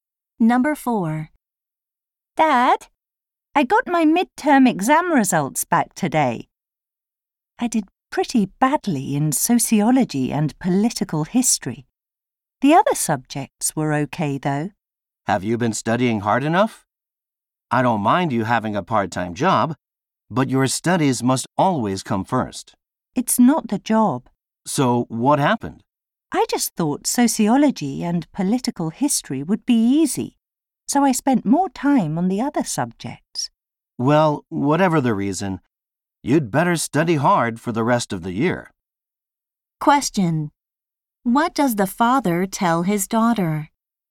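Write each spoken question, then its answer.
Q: What does the father tell his daughter?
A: She should study hard for the rest of the year.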